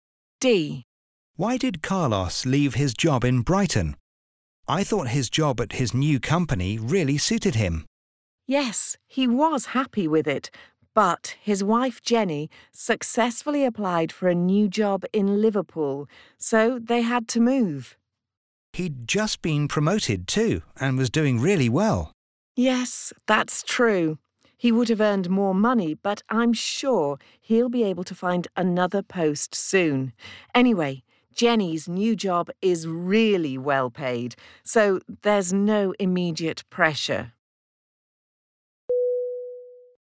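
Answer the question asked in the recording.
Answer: His wife Jenny got a new job in Liverpool, so they had to move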